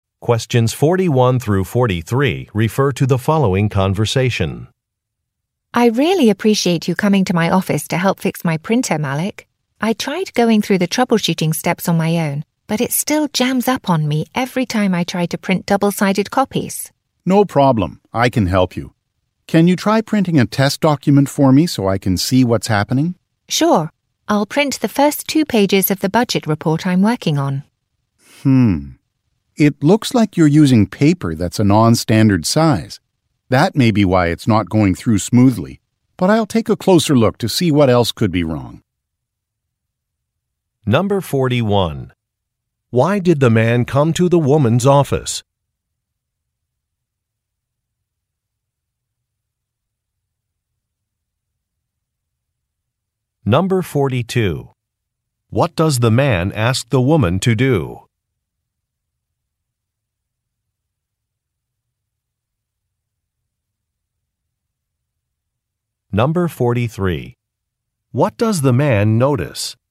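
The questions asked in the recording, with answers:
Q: Why did the man come to the woman's office?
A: To fix her printer

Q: What does the man ask the woman to do?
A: Print a test document

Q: What does the man notice?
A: She is using non-standard size paper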